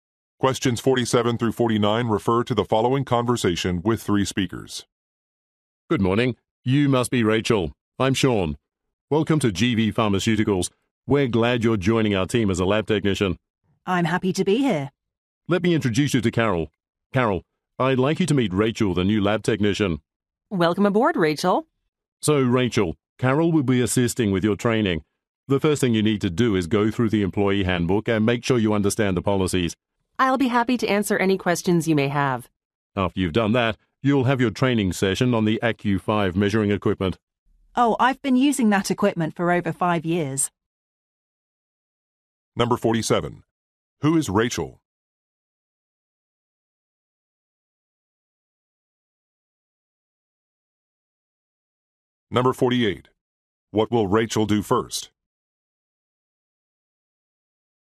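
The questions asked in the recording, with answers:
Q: Who is Rachel?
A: A new lab technician

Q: What will Rachel do first?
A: Read the employee handbook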